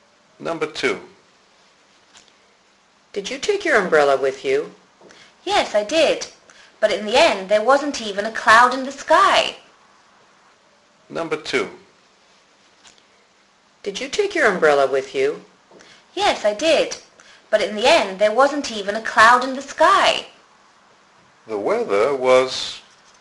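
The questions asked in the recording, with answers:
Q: The weather was...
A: sunny, with no clouds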